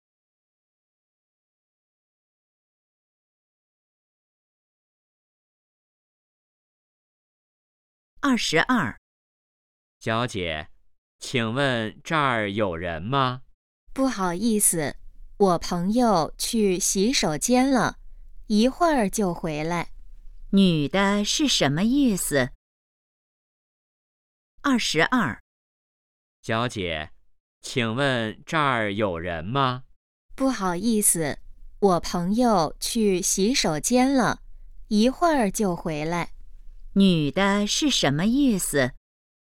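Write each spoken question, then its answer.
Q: 女的是什么意思?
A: 这儿有人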